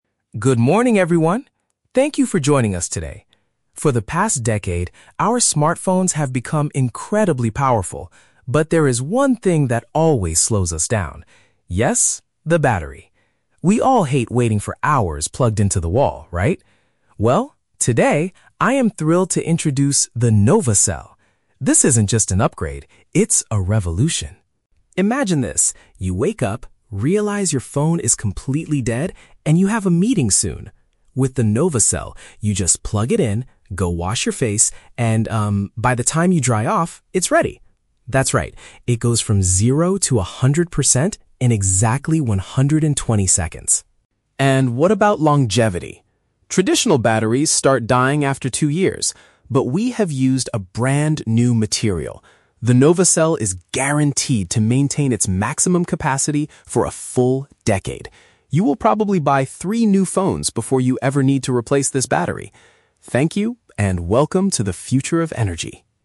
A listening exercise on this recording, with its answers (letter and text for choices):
Listen to a CEO giving a product presentation and choose the correct answer (A, B, or C) for each question.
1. What is the main problem with current smartphones mentioned by the CEO?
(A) They take too much time to recharge.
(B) They do not have enough computing power.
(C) They are too expensive for normal users.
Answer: (A) They take too much time to recharge.

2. How fast does the new Nova Cell reach a complete charge?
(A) In precisely two hours.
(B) In exactly two minutes.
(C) In less than one minute.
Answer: (B) In exactly two minutes.

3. What does the CEO promise regarding the lifespan of the new product?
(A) It must be replaced after twenty-four months of use.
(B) It will outlast three generations of future smartphones.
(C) It will hold its maximum power for ten years.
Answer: (C) It will hold its maximum power for ten years.

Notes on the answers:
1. The CEO says that we all hate "waiting for hours plugged into the wall." "Take too much time to recharge" is a paraphrase of this idea.
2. The speaker announces that the battery goes from zero to a hundred percent in "exactly 120 seconds." 120 seconds is the exact same amount of time as two minutes.
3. The CEO guarantees the battery will maintain its maximum capacity for a "full decade." A decade means ten years.

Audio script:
CEO: Good morning, everyone! Thank you for joining us today. For the past decade, our smartphones have become incredibly powerful, but there is one thing that always slows us down. Yes, the battery. We all hate waiting for hours plugged into the wall, right? Well, today, I am thrilled to introduce the 'Nova Cell'. This isn't just an upgrade; it's a revolution.
Imagine this: you wake up, realize your phone is completely dead, and you have a meeting soon. With the Nova Cell, you just plug it in, go wash your face, and, um, by the time you dry off, it's ready. That's right, it goes from zero to a hundred percent in exactly 120 seconds.
And what about longevity? Traditional batteries start dying after two years. But we have used a brand-new material. The Nova Cell is guaranteed to maintain its maximum capacity for a full decade. You will probably buy three new phones before you ever need to replace this battery! Thank you, and welcome to the future of energy.